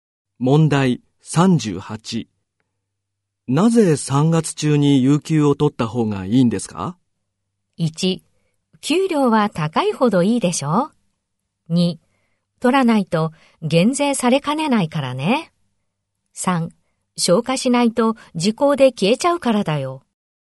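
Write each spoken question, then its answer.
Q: なぜ3月中に有給を取った方がいいんですか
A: 3: 消化しないと時効で消えちゃうからだよ。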